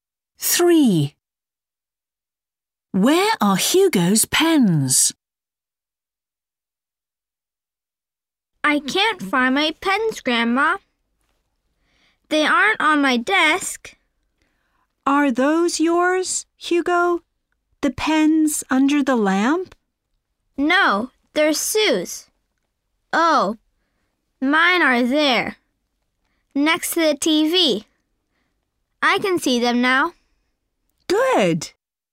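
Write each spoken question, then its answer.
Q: Where are Hugo's pens?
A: Next to the TV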